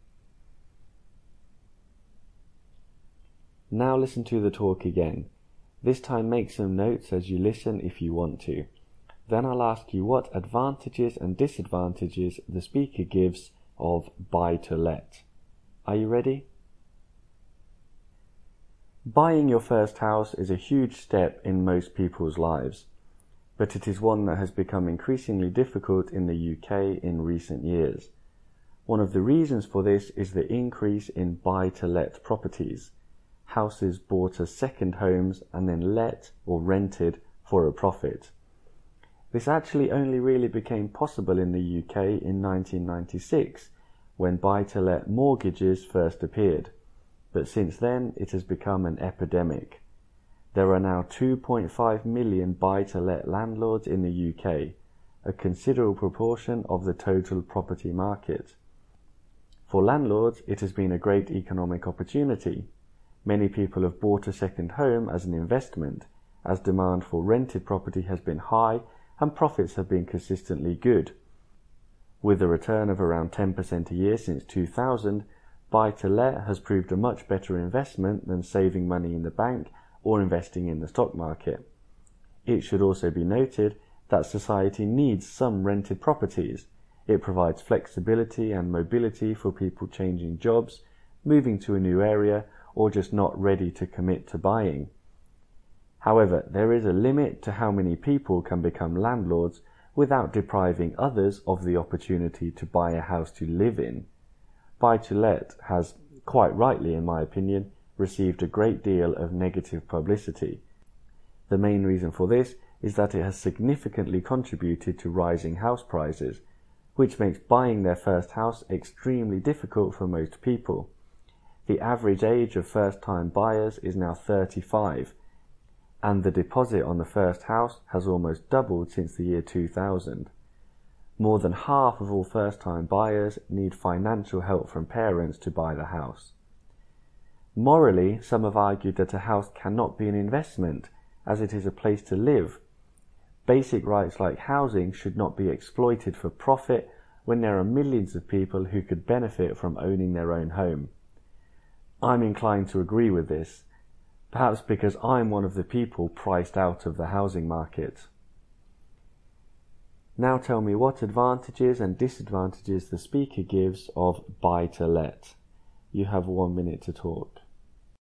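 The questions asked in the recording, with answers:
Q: Now tell me what advantages and disadvantages the speaker gives of buy to let.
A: Advantages: good investment for landlords (about 10% a year), and rented homes give people flexibility and mobility. Disadvantages: it pushes up house prices, so first-time buyers can't afford homes, and housing is exploited for profit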